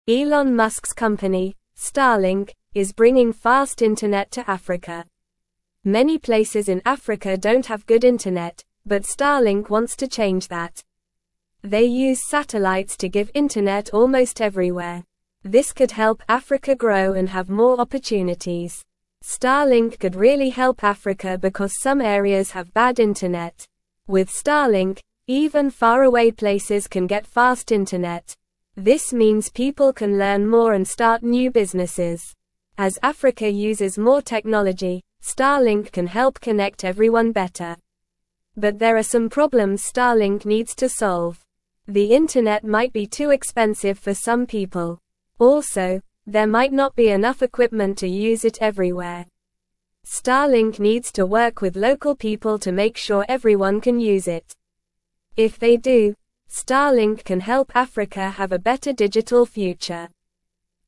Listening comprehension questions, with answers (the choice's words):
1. What is Elon Musk's company that is bringing fast internet to Africa?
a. Starlink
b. Moonlink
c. Sunlink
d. Earthlink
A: Starlink

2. How does Starlink provide internet to Africa?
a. Through underground cables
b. Through satellites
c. Through hot air balloons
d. Through telephone lines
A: Through satellites

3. Why is fast internet important for Africa according to the article?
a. To help Africa grow and have more opportunities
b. To watch more movies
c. To play video games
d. To chat with friends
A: To help Africa grow and have more opportunities

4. What can people do with fast internet in Africa?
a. Watch more TV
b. Sleep more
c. Eat more food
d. Learn more and start new businesses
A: Learn more and start new businesses

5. What are some problems Starlink needs to solve in Africa?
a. Internet might be too slow for some people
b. Internet might be too colorful for some people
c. Internet might be too loud for some people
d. Internet might be too expensive for some people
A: Internet might be too expensive for some people

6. What does Starlink need to work with local people to ensure?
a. Everyone can dance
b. Everyone can fly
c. Everyone can use the internet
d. Everyone can sing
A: Everyone can use the internet

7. How can Starlink help Africa have a better digital future?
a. By making everyone wear hats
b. By teaching everyone to swim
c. By connecting everyone better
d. By painting everything blue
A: By connecting everyone better

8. What is the main goal of Starlink in Africa?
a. To sell ice cream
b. To provide fast internet to areas with bad internet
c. To teach yoga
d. To build sandcastles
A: To provide fast internet to areas with bad internet

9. Elon Musk's company, Starlink, is bringing fast (1)______ to Africa.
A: internet

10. (2)______ places in Africa don't have good internet, but Starlink (3)______ to change that.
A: Many

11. (2)______ places in Africa don't have good internet, but Starlink (3)______ to change that.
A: wants

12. This could help Africa grow and (4)______ more (5)______.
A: have

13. This could help Africa grow and (4)______ more (5)______.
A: opportunities

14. Starlink could really help Africa because some (6)______ have bad internet.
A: areas

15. As Africa uses more technology, (7)______ can help (8)______ everyone better.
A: Starlink

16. As Africa uses more technology, (7)______ can help (8)______ everyone better.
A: connect

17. The internet might be too (9)______ for some people.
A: expensive

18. Also, there might not be (10)______ equipment to use it everywhere.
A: enough

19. Starlink (11)______ to work with (12)______ people to make sure everyone can use it.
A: needs

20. Starlink (11)______ to work with (12)______ people to make sure everyone can use it.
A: local

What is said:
Elon Musk's company, Starlink, is bringing fast internet to Africa. Many places in Africa don't have good internet, but Starlink wants to change that. They use satellites to give internet almost everywhere. This could help Africa grow and have more opportunities.
Starlink could really help Africa because some areas have bad internet. With Starlink, even faraway places can get fast internet. This means people can learn more and start new businesses. As Africa uses more technology, Starlink can help connect everyone better.
But there are some problems Starlink needs to solve. The internet might be too expensive for some people. Also, there might not be enough equipment to use it everywhere. Starlink needs to work with local people to make sure everyone can use it. If they do, Starlink can help Africa have a better digital future.

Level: Level 2